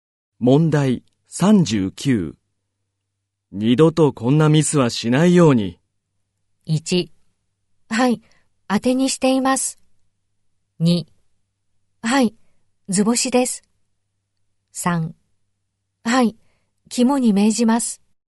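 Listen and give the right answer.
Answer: 3: はい、肝に銘じます。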